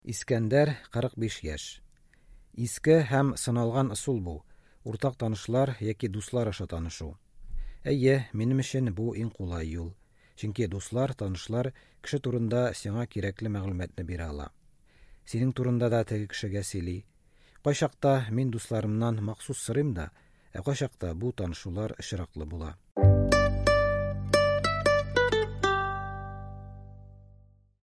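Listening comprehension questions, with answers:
Бирем. Ответьте на вопросы по тексту.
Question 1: Искәндәр өчен иң кулай танышу юлы нинди?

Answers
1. Уртак танышлар яки дуслар аша танышу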